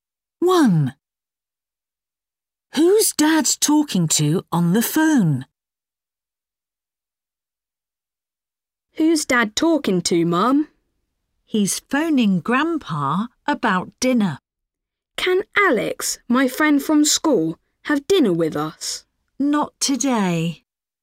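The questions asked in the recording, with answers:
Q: Who's Dad talking to on the phone?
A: Grandpa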